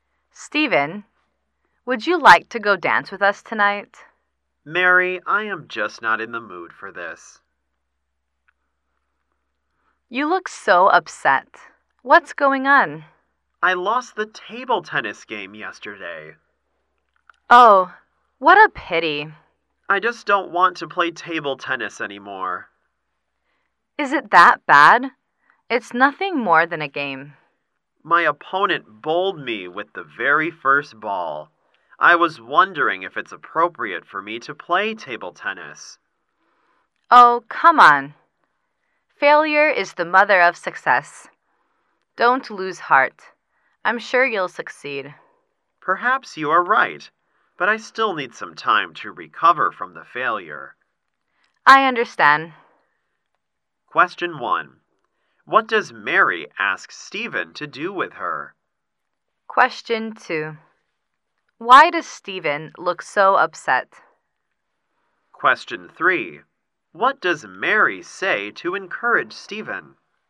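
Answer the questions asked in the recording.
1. Go dancing tonight
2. He lost the table tennis game yesterday
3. Failure is the mother of success; don't lose heart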